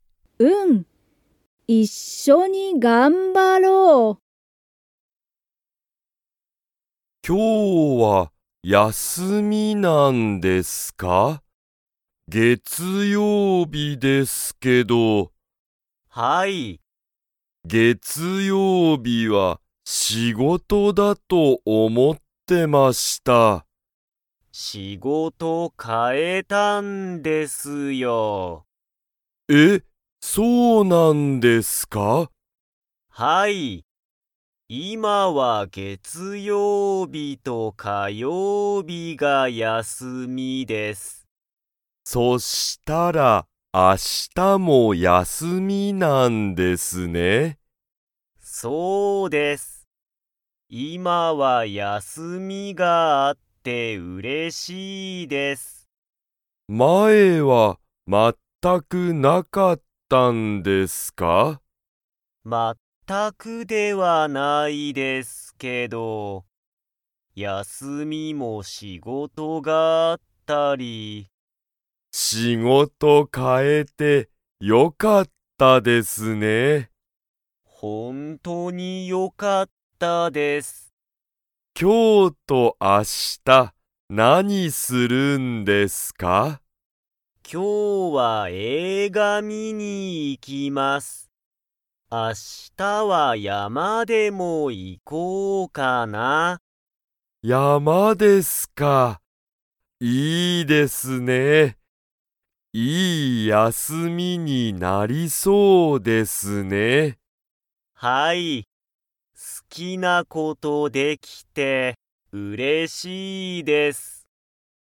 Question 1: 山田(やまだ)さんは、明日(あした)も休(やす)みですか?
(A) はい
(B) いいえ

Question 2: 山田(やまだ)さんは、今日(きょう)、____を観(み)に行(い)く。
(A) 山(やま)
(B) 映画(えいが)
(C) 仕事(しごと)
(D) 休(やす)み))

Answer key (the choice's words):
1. はい
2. 映画(えいが)

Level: Level 2